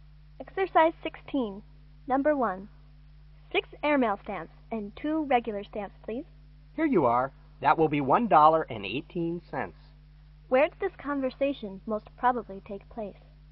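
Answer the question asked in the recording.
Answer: At a post office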